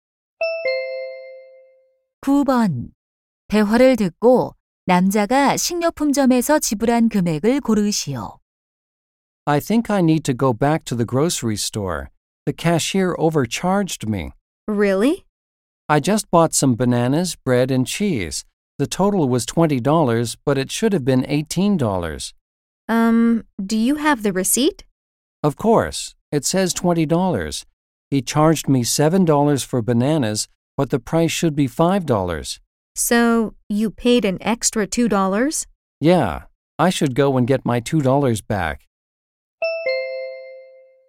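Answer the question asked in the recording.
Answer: 20달러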